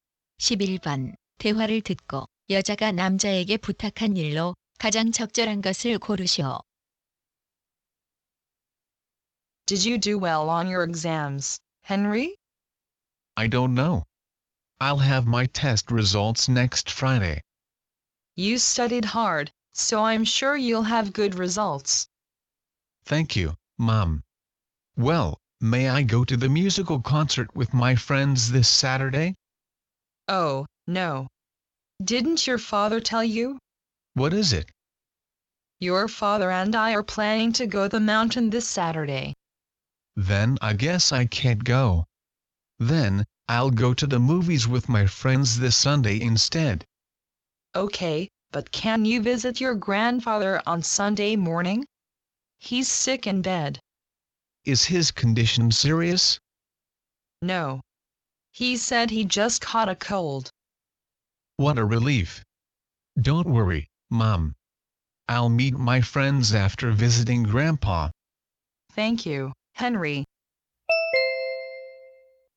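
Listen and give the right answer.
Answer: 일요일 아침에 할아버지 찾아뵙기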